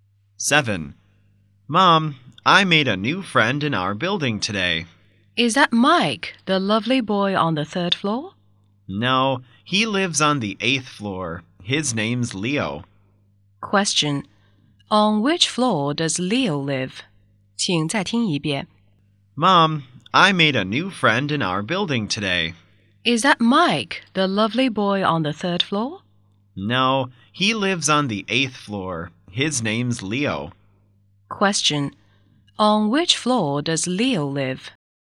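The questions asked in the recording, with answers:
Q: On which floor does Leo live?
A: On the eighth floor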